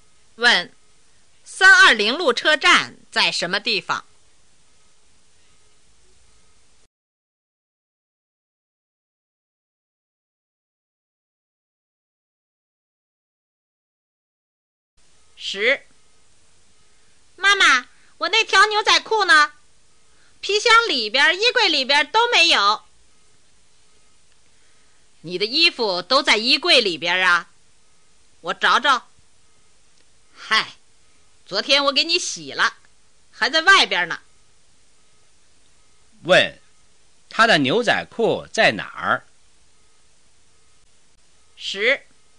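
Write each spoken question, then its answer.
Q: 他的牛仔裤在哪儿?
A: 在外边(洗了还没收)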